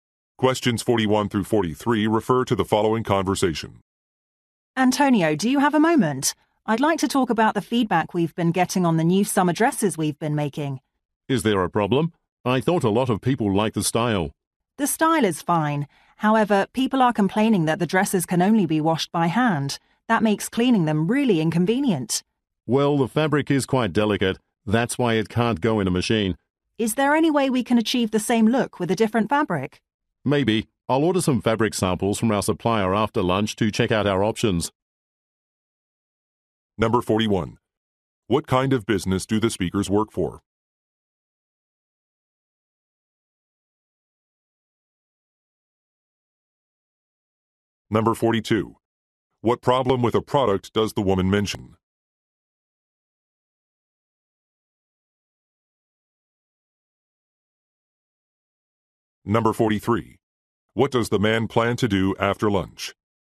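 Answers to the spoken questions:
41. A clothing maker
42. The dresses can only be washed by hand
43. Order fabric samples from the supplier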